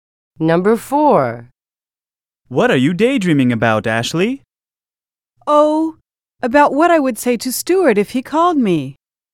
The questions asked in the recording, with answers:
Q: Oh, about what I would say to Stuart if he called me.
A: Present is the correct answer.